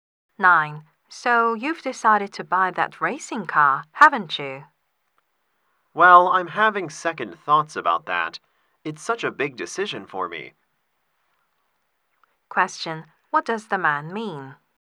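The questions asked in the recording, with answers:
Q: What does the man mean?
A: He is reconsidering buying the car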